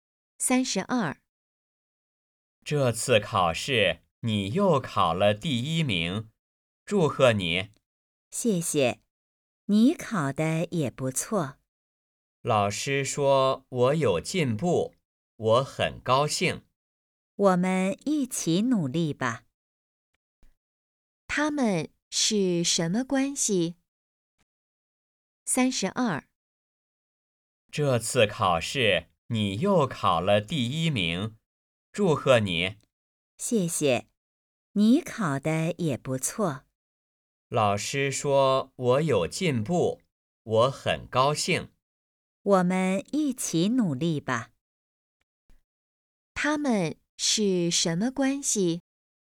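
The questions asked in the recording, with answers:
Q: 他们是什么关系?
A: 同学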